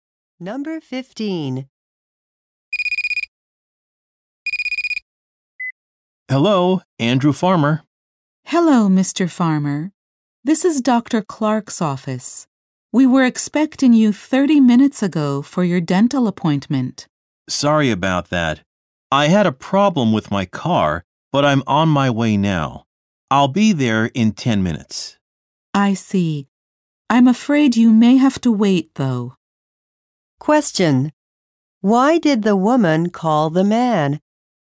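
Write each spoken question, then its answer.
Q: Why did the woman call the man?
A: He was late for his dental appointment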